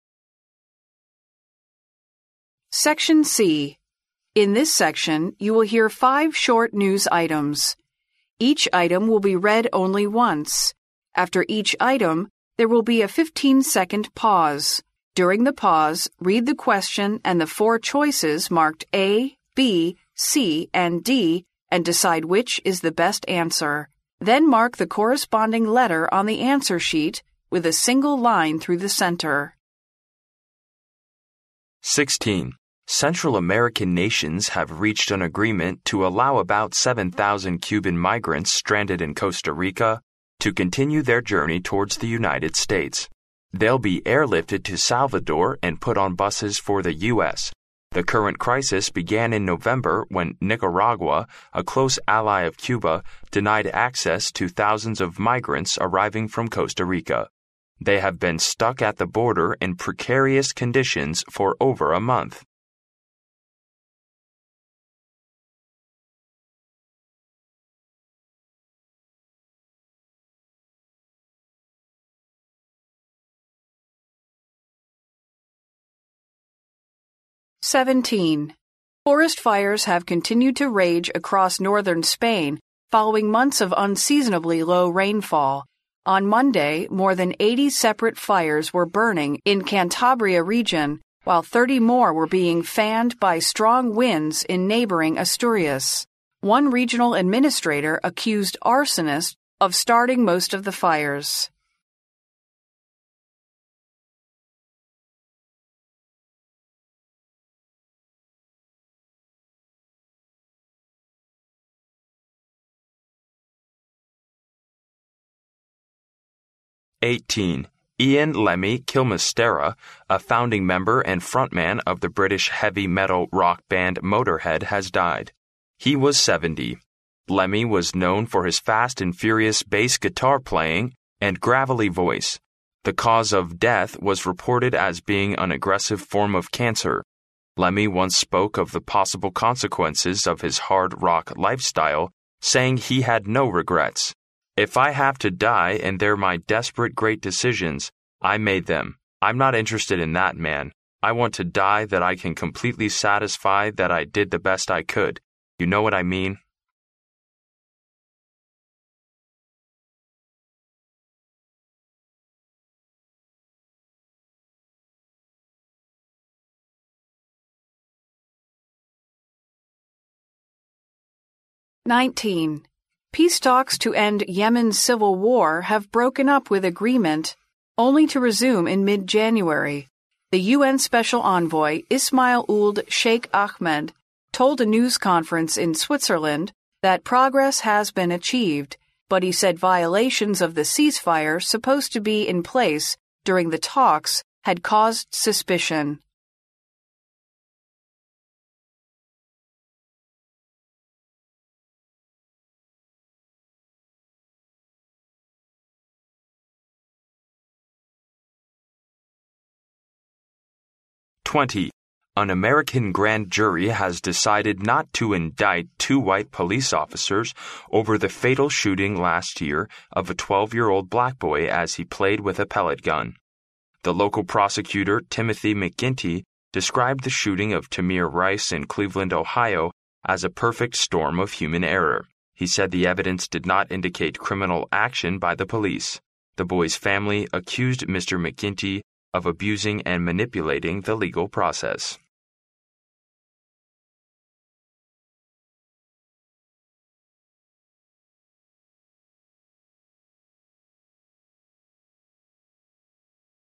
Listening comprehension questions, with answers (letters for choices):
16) What is reported in the news?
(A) 7000 Cuban migrants were stranded in some Central American nations.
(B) The migrants will be airlifted to Salvador and moved to U.S. by bus.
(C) Nicaragua accepted thousands of migrants arriving from Costa Rica.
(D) The migrants were at the border in precarious conditions for two months.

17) Why have forest fires continued to rage across northern Spain?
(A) There has been little rain for months.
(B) The wind has been strong all the time.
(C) The government did not take quick action.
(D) Arsonists have kept starting fires.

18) What can be learned about the famous star?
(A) He was diagnosed with cancer at the age of 70.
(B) He was a founding member of a heavy metal rock band.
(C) He was known for his fast and furious piano playing.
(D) He said his incomplete music life was regrettable.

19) What is said about the peace talks to end Yemen's civil war?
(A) They were held in Switzerland and chaired by UN's special envoy.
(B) They have brought about temporary peace in this Arab country.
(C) They have broken up and will not resume until mid-January.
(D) They have not achieved any progress in the past few months.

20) What did the family of the dead think of the grand jury's verdict?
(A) It was an insult to the dead.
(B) It was a challenge to public opinion.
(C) It was a violation of human rights.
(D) It was an abuse of the legal process.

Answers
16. B
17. A
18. B
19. C
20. D

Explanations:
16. 新闻中谈到中美国家对这些滞留在哥斯达黎加的古巴移民的处理办法时,提到这些移民将会"...be airlifted to Salvador and put on buses for the U.S.(被空运到萨尔瓦多,再由巴士送往美国)",故答案选B。
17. 新闻开头谈到了西班牙北部火势持续蔓延是因为数月以来天气少雨(...following months of unreasonably low rainfall),所以答案选A。
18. 新闻开头便介绍该明星是英国重金属摇滚乐队的创始人(...a founding member and front man of the British heavy metal rock band...),故答案选B。
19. 新闻开头谈到了结束也门内战的和平谈判破裂,达成的协议要到一月中旬才会重新恢复(...have broken up with agreement only to resume in mid-January)。所以答案选C。

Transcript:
【录音原文】 Central American nations have reached an agreement to allow about 7000 Cuban migrants stranded in Costa Rica to continue their journey towards the United States. They'll be airlifted to Salvador and put on buses for the U.S. "The current crisis began in November when Nicaragua, a close ally of Cuba, denied access to thousands of migrants arriving from Costa Rica. They have been stuck at the border in precarious conditions for over a month."
17 Why have forest fires continued to rage across northern Spain?
【录音原文】 Forest fires have continued to rage across northern Spain following months of unreasonably low rainfall. On Monday, more than 80 separate fires were burning in Cantabria region while 30 more were being fanned by strong winds in neighboring Asturias. One regional administrator accused arsonists of starting most of the fires.
18 What can be learned about the famous star?
【录音原文】 Ian Lemmy Kilmistera, a founding member and front man of the British heavy metal rock band Motor Head has died. He was 70. Lemmy was known for his fast and furious base guitar and gravelly voice. The cause of death was reported as being an aggressive form of cancer. Lemmy once spoke of the possible consequences of his hard rock life style saying he had no regrets. "If I have to die and they're my desperate great decisions. I made them; I'm not interested in that, man. I want to die that I can completely satisfy that I did the best I could. You know what I mean?"
19 What is said about the peace talks to end Yemen's civil war?
【录音原文】 Peace talks to end Yemen's civil war have broken up with agreement only to resume in mid-January. The UN special envoy Ismail Ould Cheikh Ahmed told a news conference in Switzerland that progress has been achieved, but he said violations of the cease fire supposed to be in place during the talks had caused suspicion.
20 What did the family of the dead think of the grand jury's verdict?
【录音原文】 An American grand jury has decided not to indict two white police officers over the fatal shooting last year of a 12-year-old black boy as he played with a pellet gun. The local prosecutor Timothy McGinty described the shooting of Tamir Rice in Cleveland, Ohio, as a perfect storm of human error. He said the evidence did not indicate criminal action by the police. The boy's family accused Mr. McGinty of abusing and manipulating the legal process.
For questions 21—30, complete the notes using no more than three words for each blank.